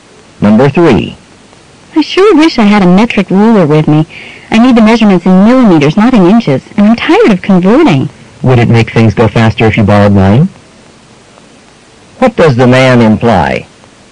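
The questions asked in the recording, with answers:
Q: What does the man imply?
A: The woman can borrow his metric ruler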